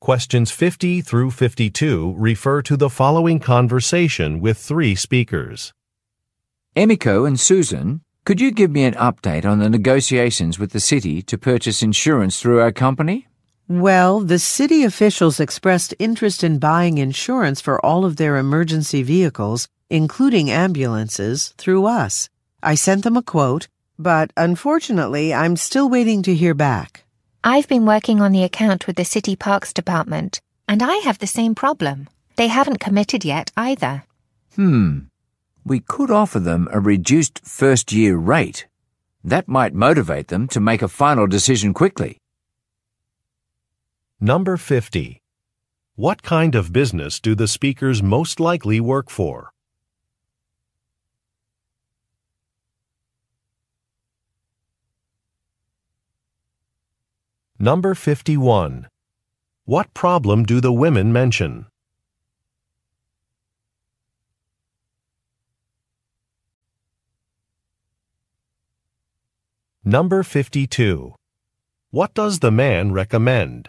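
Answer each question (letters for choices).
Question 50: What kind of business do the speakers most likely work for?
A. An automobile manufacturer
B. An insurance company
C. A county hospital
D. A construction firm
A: B

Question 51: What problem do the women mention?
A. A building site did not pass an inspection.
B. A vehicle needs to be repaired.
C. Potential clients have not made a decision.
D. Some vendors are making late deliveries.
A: C

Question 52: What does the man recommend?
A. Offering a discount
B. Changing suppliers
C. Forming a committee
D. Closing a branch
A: A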